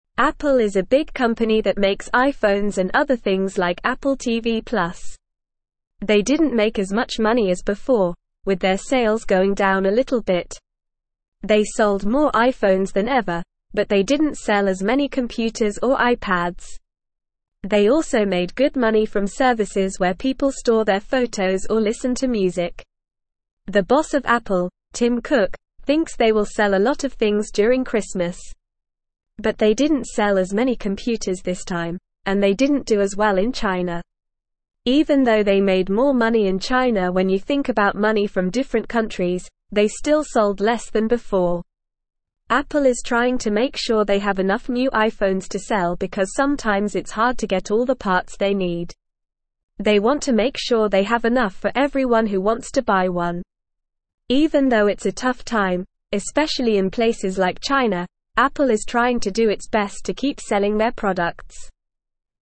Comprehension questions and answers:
Listen and Fill in the Gaps:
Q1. They didn't make as much money as before, with their sales (1)______ down a little bit.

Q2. They sold (2)______ iPhones than ever, but they didn't sell as many computers or (3)______.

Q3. They sold (2)______ iPhones than ever, but they didn't sell as many computers or (3)______.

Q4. They also made good money from services where people store their photos or (4)______ to music.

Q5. The boss of (5)______, Tim Cook, thinks they will sell a lot of things during Christmas.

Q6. But they didn't sell as (6)______ computers this time, and they didn't do as well in China.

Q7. Even though they made more money in China when you think about money from different countries, they still (7)______ less than before.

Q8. Apple is trying to (8)______ sure they have (9)______ new iPhones to sell because sometimes it's hard to get all the (10)______ they need.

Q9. Apple is trying to (8)______ sure they have (9)______ new iPhones to sell because sometimes it's hard to get all the (10)______ they need.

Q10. Apple is trying to (8)______ sure they have (9)______ new iPhones to sell because sometimes it's hard to get all the (10)______ they need.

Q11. Even though it's a tough (11)______, especially in places like China, Apple is trying to do its best to (12)______ selling their products.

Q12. Even though it's a tough (11)______, especially in places like China, Apple is trying to do its best to (12)______ selling their products.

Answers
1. going
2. more
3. iPads
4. listen
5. Apple
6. many
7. sold
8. make
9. enough
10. parts
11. time
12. keep

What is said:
Apple is a big company that makes iPhones and other things like Apple TV+. They didn't make as much money as before, with their sales going down a little bit. They sold more iPhones than ever, but they didn't sell as many computers or iPads. They also made good money from services where people store their photos or listen to music.
The boss of Apple, Tim Cook, thinks they will sell a lot of things during Christmas. But they didn't sell as many computers this time, and they didn't do as well in China. Even though they made more money in China when you think about money from different countries, they still sold less than before.
Apple is trying to make sure they have enough new iPhones to sell because sometimes it's hard to get all the parts they need. They want to make sure they have enough for everyone who wants to buy one. Even though it's a tough time, especially in places like China, Apple is trying to do its best to keep selling their products.

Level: Level 2